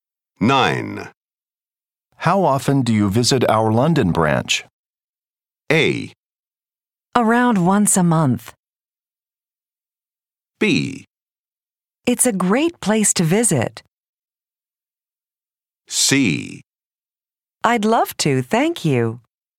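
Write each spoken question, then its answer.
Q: How often do you visit our London branch?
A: A: Around once a month.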